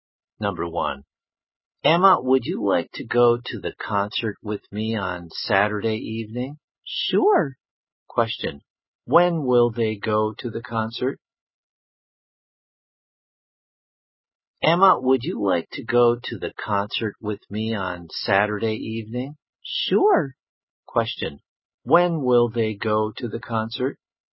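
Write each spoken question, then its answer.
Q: Question, when will they go to the concert?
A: On Saturday evening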